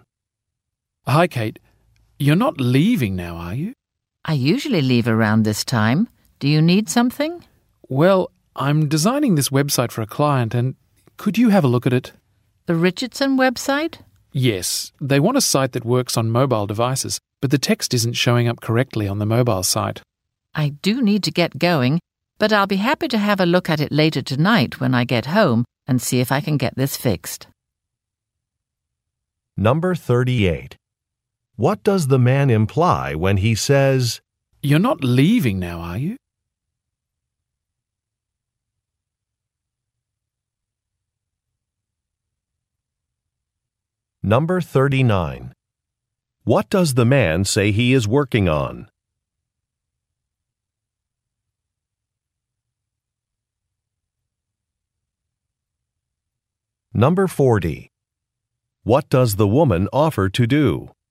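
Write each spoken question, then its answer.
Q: What does the man say he is working on?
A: A website for a client (the Richardson website)

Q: What does the woman offer to do?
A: Look at the website later tonight from home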